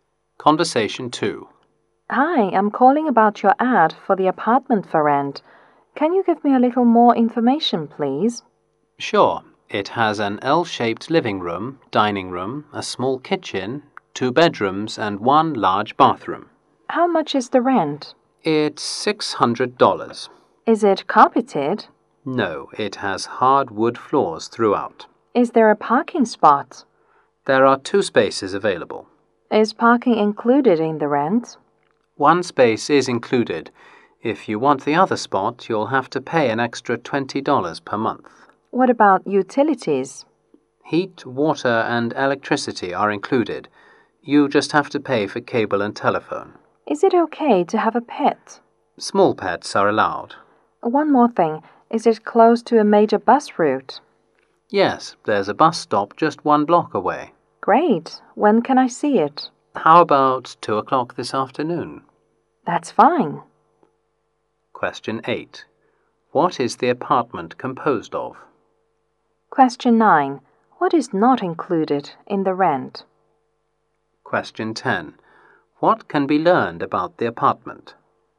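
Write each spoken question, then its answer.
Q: What is the apartment composed of?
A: An L-shaped living room, a dining room, a small kitchen, two bedrooms and one large bathroom

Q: What is not included in the rent?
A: Cable and telephone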